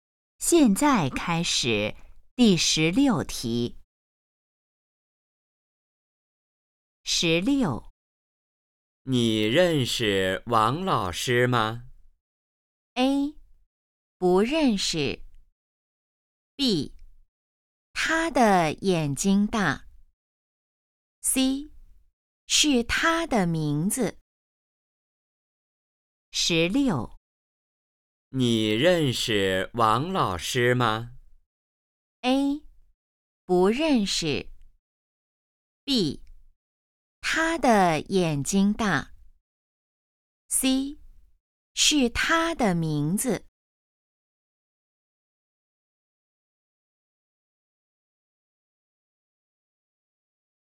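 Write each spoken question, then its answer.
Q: 你认识王老师吗?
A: A: 不认识。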